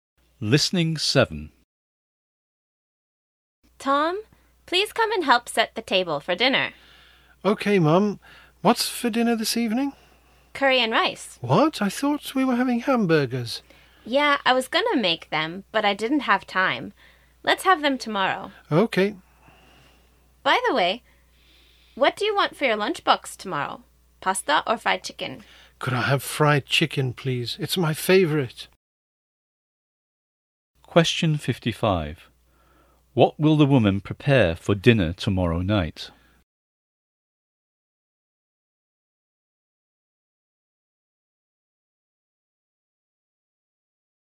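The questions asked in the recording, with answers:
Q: What will the woman prepare for dinner tomorrow night?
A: Hamburgers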